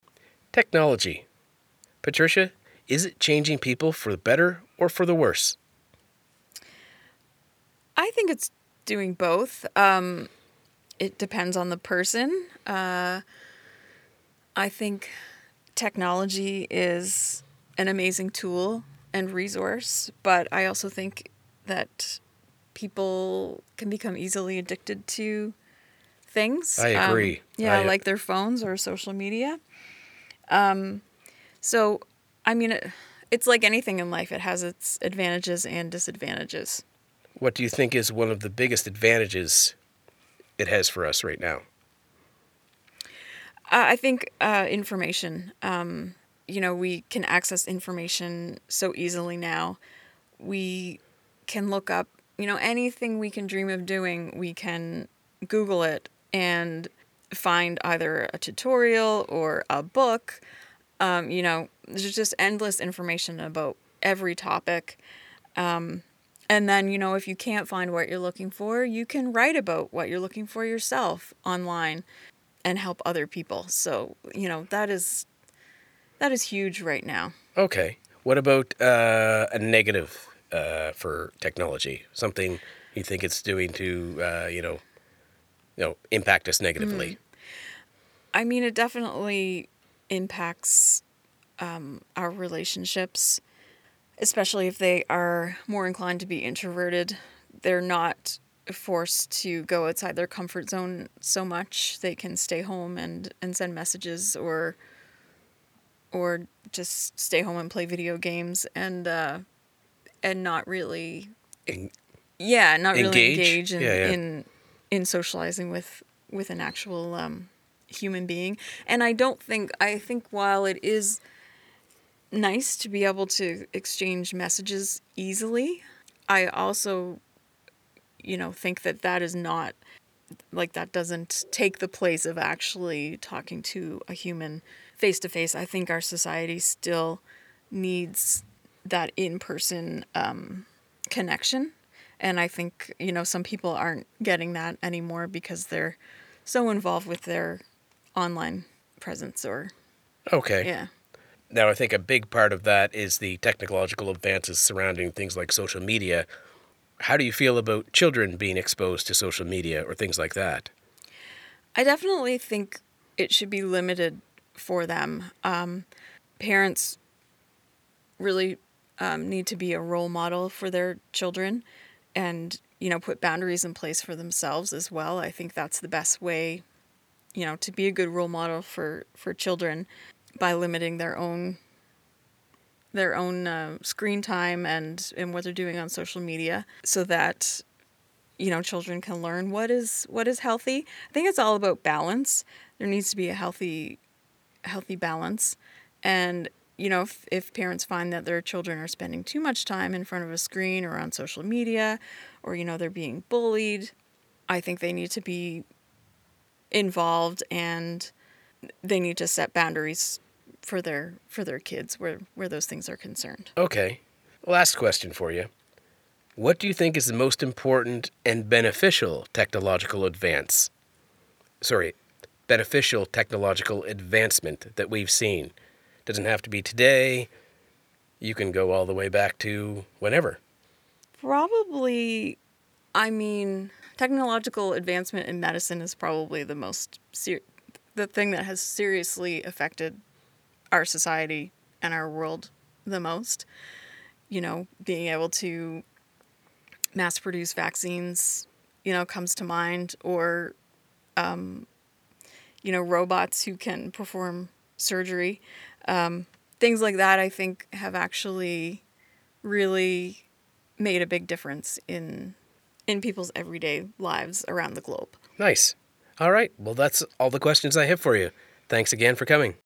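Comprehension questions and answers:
用 1-2 句话用自己的话回答下面的问题。点「✨ AI 判断」后,AI 会对照当天 transcript 给出参考要点与评分。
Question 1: According to Patricia, what are two specific examples of disadvantages or negative impacts of technology on people?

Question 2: What does Patricia say parents should do to be a good role model for their children regarding technology and social media?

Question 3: What two examples does Patricia give of technological advancements in medicine that have made a big difference globally?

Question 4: According to Patricia, what is one "huge" positive of technology right now, and what can you do if you cannot find what you are looking for?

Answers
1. People can become addicted to phones or social media, and it harms relationships because introverted people stay home and don't engage face to face.
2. Put boundaries in place for themselves by limiting their own screen time and social media use.
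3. Mass-producing vaccines and robots that can perform surgery.
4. Easy access to information; you can write about it yourself online and help other people.

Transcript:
Technology. Patricia, is it changing people for the better or for the worse?
Patricia
I think it's doing both. It depends on the person. I think technology is an amazing tool and resource, but I also think that people can become easily addicted to things.
I agree.
Patricia
Yeah, like their phones or social media. So, I mean, it's like anything in life, it has its advantages and disadvantages.
What do you think is one of the biggest advantages it has for us right now?
Patricia
I think information. You know, we can access information so easily now. We can look up, you know, anything we can dream of doing; we can Google it and find either a tutorial or a book. There's just endless information about every topic. And then, if you can't find what you're looking for, you can write about what you're looking for yourself online and help other people. 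So, you know, that is huge right now.
Okay. What about a negative for technology? Something you think it's doing to, you know, impact us negatively?
Patricia
I mean, it definitely impacts our relationships, especially if they are more inclined to be introverted; they're not forced to go outside their comfort zone so much. They can stay home and send messages or just stay home and play video games and not really...
Engage?
Patricia
engage in socializing with an actual human being. And I think while it is nice to be able to exchange messages easily, I also think that that is not, that doesn't take the place of actually talking to a human face to face. I think our society still needs that in-person connection. And I think, you know, some people aren't getting that anymore because they're so involved with their online presence or, yeah.
Okay. Now, I think a big part of that is the technological advances surrounding, things like social media. 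How do you feel about children being exposed to social media or things like that?
Patricia
I definitely think it should be limited for them. Parents really need to be a role model for their children and put boundaries in place for themselves as well. I think that's the best way to be a good role model for children, by limiting their own screen time and what they're doing on social media so that children can learn what is healthy. I think it's all about balance. There needs to be a healthy balance. And if, you know, parents find that their children are spending too much time in front of a screen or on social media, or, you know, they're being bullied, I think they need to be involved and they need to set boundaries for their kids where those things are concerned.
Okay. Last question for you. What do you think is the most important and beneficial technological advance, sorry, beneficial technological advancement that we've seen? 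Doesn't have to be today, you can go all the way back to whenever.
Patricia
Probably, I mean, technological advancement in medicine is probably the thing that has seriously affected our society and our world the most, you know, being able to mass produce vaccines comes to mind or, you know, robots who can perform surgery.
PatriciaProbably, I mean, technological advancement in medicine is probably the thing that has seriously affected our society and our world the most, you know, being able to mass produce vaccines comes to mind or, you know, robots who can perform surgery. Things like that I think have actually really made a big difference in people's everyday lives around the globe.
All right. Well, that's all the questions I have for you. Thanks again for coming.

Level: CEFRB2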